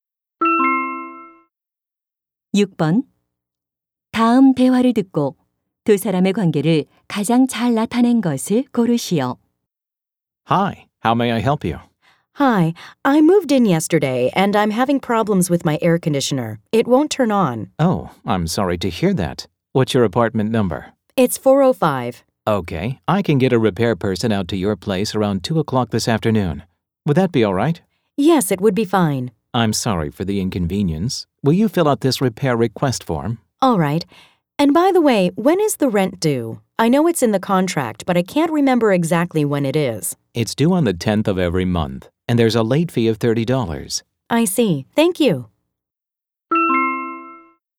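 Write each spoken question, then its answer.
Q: 다음 대화를 듣고 두 사람의 관계를 가장 잘 나타낸 것을 고르시오.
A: 아파트 관리인과 세입자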